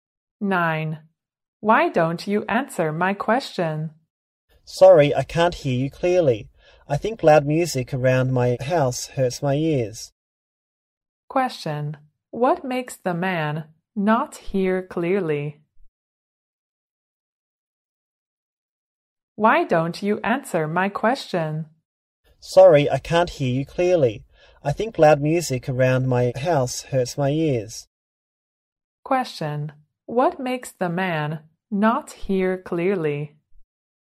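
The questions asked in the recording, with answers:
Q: What makes the man not hear clearly?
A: Loud music around his house.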